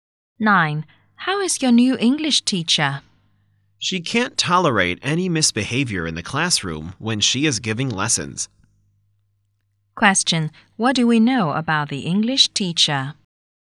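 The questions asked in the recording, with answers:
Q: What do we know about the English teacher?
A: She is strict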